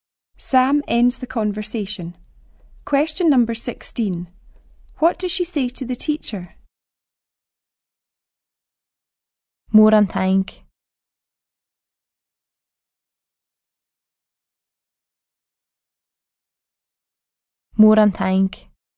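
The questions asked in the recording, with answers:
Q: What does she say to the teacher?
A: Thank you very much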